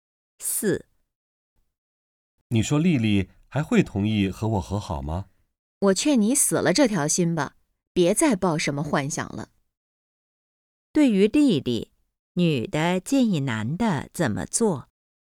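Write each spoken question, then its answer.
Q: 对于丽丽,女的建议男的怎么做?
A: 死了这条心,别再抱幻想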